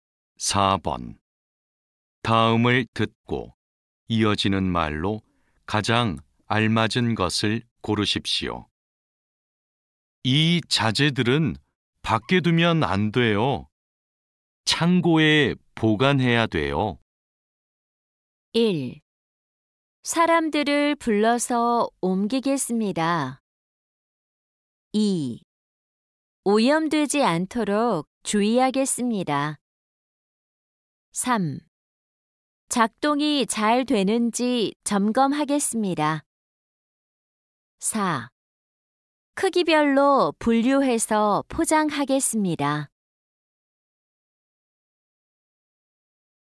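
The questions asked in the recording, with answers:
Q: 이 자재들은 밖에 두면 안 돼요. 창고에 보관해야 돼요.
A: 1: 사람들을 불러서 옮기겠습니다.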